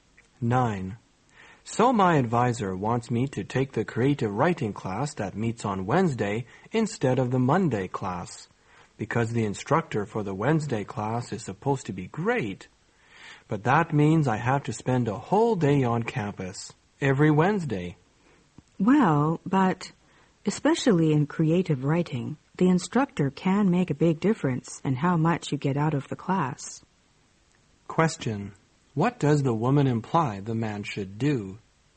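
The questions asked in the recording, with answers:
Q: What does the woman imply the man should do?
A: Take the Wednesday class.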